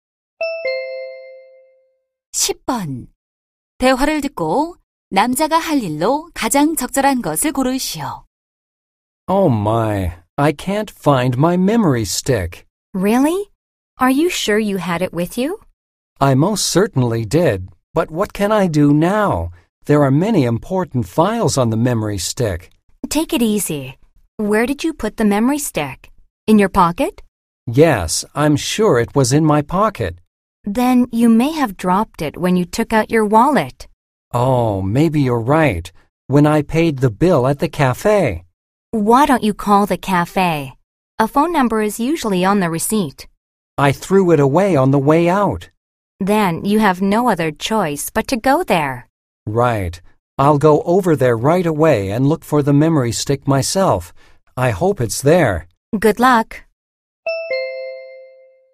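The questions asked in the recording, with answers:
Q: 대화를 듣고 남자가 할 일로 가장 적절한 것을 고르시오.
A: 카페에 가서 메모리 스틱 찾기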